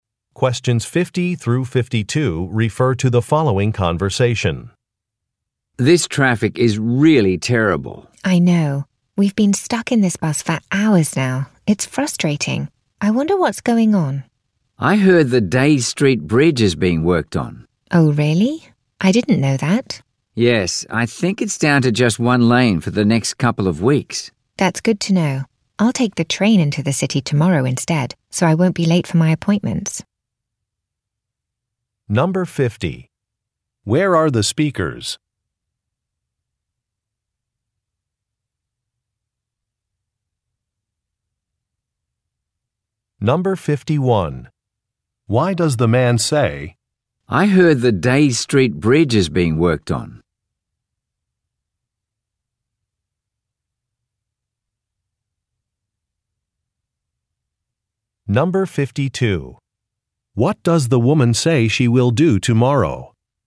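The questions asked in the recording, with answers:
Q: Where are the speakers?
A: On a bus

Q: Why does the man say,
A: To explain why the traffic is slow (the bridge is under repair)

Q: What does the woman say she will do tomorrow?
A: Take the train into the city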